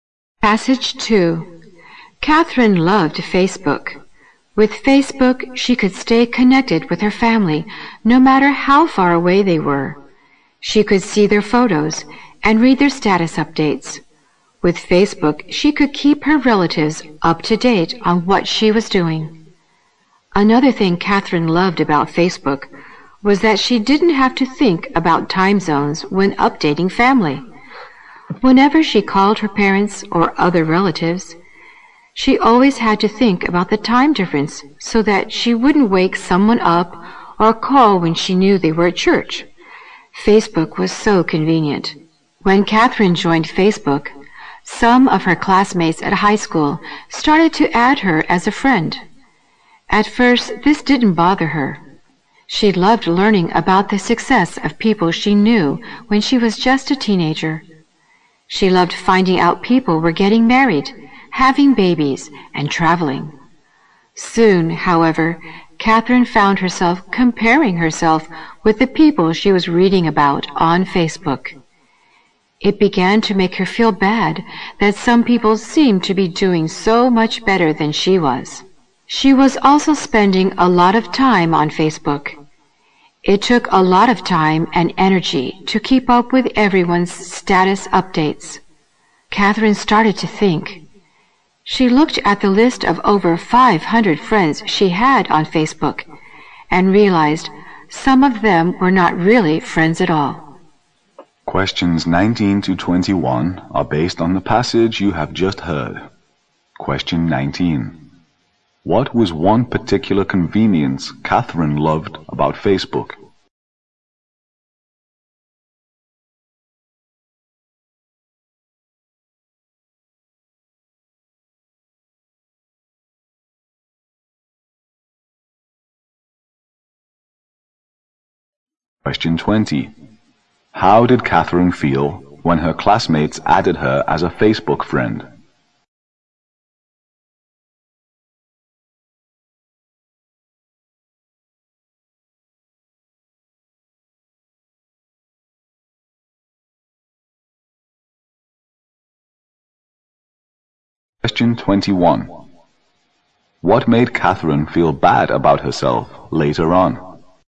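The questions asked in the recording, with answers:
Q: What was one particular convenience Catherine loved about Facebook?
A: She didn't have to think about time zones when updating family

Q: How did Catherine feel when her classmates added her as a Facebook friend?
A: It didn't bother her at first; she loved learning of their success

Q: What made Catherine feel bad about herself later on?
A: Comparing herself with people who seemed to be doing better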